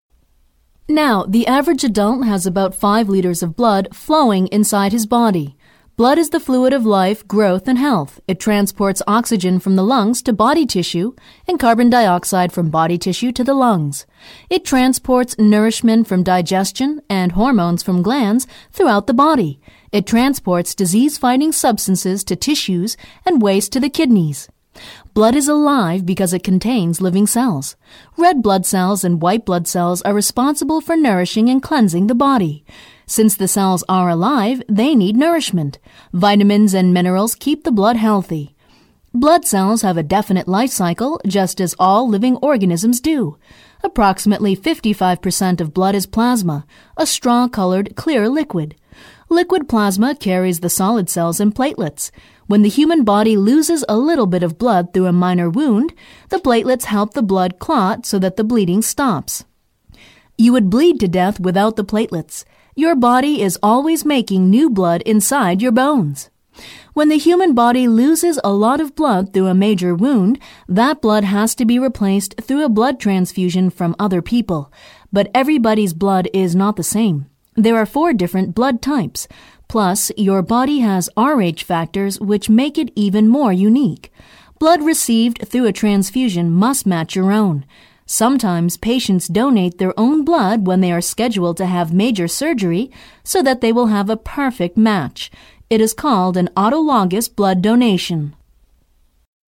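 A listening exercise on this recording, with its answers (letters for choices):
Listen to the recording and answer the multiple-choice question by selecting the correct response. Only one response is correct.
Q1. According to the professor, what was the main reason that patients donated their own blood?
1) To make new blood in the bones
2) To have a perfect blood match for transfusions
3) To donate blood to other people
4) To keep the body healthy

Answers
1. 2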